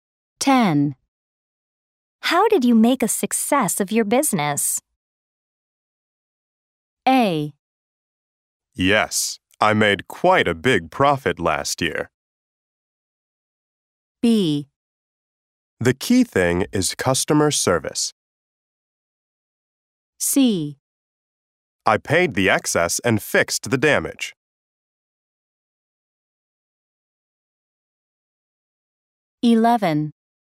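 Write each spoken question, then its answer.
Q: How did you make a success of your business?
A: B: The key thing is customer service.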